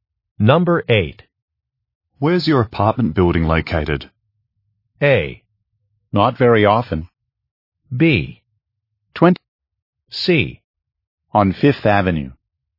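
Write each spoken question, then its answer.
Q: Where's your apartment building located?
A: C: On 5th Avenue.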